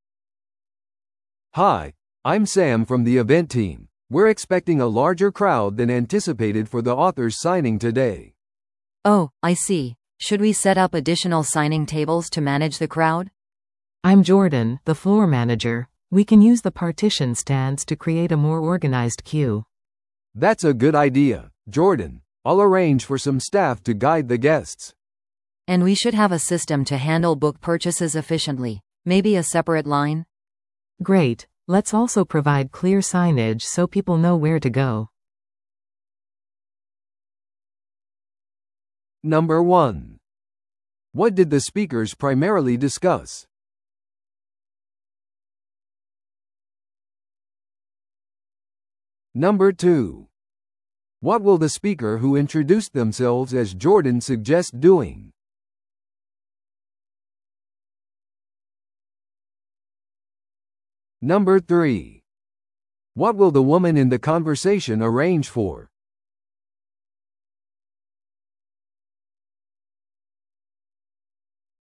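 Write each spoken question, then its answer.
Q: What did the speakers primarily discuss?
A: Managing a larger-than-expected crowd at an author's book signing

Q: What will the speaker who introduced themselves as Jordan suggest doing?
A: Using partition stands to create a more organized queue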